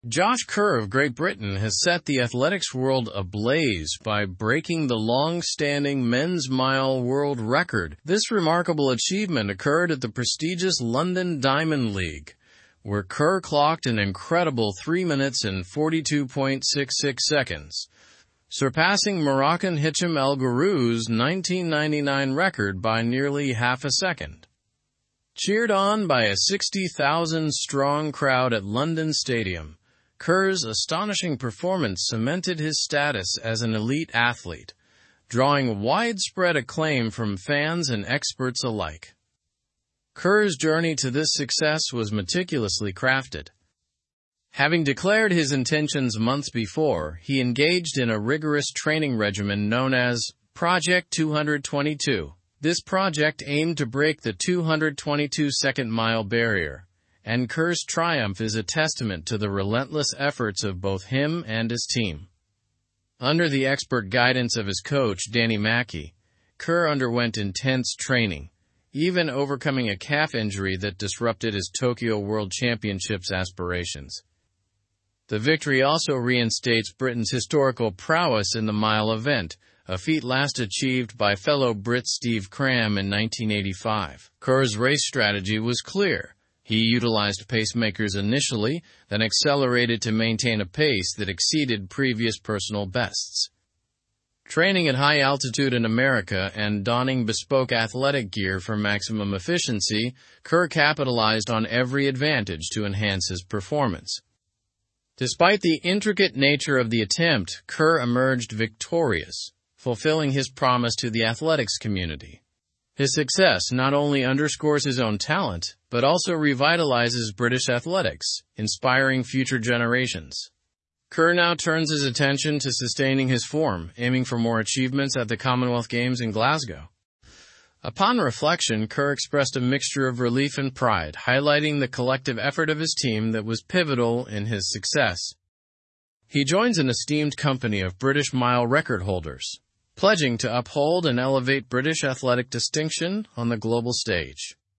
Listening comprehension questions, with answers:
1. What record did Josh Kerr break?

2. Where did Josh Kerr break this record?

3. Who held the men's mile world record before Josh Kerr?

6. How did Kerr prepare for his record-breaking race?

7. What event is Josh Kerr focusing on after his record-breaking feat?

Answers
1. The men's mile world record.
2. At the London Diamond League.
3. Hicham El Guerrouj.
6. By training rigorously, including at high altitude.
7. The Commonwealth Games in Glasgow.

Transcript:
Josh Kerr of Great Britain has set the athletics world ablaze by breaking the longstanding men's mile world record. This remarkable achievement occurred at the prestigious London Diamond League, where Kerr clocked an incredible 3 minutes and 42.66 seconds, surpassing Moroccan Hicham El Guerrouj's 1999 record by nearly half a second. Cheered on by a 60,000-strong crowd at London Stadium, Kerr's astonishing performance cemented his status as an elite athlete, drawing widespread acclaim from fans and experts alike.
Kerr's journey to this success was meticulously crafted. Having declared his intentions months before, he engaged in a rigorous training regimen known as 'Project 222.' This project aimed to break the 222-second mile barrier, and Kerr's triumph is a testament to the relentless efforts of both him and his team. Under the expert guidance of his coach, Danny Mackey, Kerr underwent intense training, even overcoming a calf injury that disrupted his Tokyo World Championships aspirations.
The victory also reinstates Britain's historical prowess in the mile event, a feat last achieved by fellow Brit Steve Cram in 1985. Kerr's race strategy was clear: he utilized pacemakers initially, then accelerated to maintain a pace that exceeded previous personal bests. Training at high altitude in America and donning bespoke athletic gear for maximum efficiency, Kerr capitalized on every advantage to enhance his performance.
Despite the intricate nature of the attempt, Kerr emerged victorious, fulfilling his promise to the athletics community. His success not only underscores his own talent but also revitalizes British athletics, inspiring future generations. Kerr now turns his attention to sustaining his form, aiming for more achievements at the Commonwealth Games in Glasgow.
Upon reflection, Kerr expressed a mixture of relief and pride, highlighting the collective effort of his team that was pivotal in his success.
of his team that was ? in his success. He joins an esteemed company of British mile record holders, pledging to uphold and elevate British athletic ? on the global stage.

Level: Level 4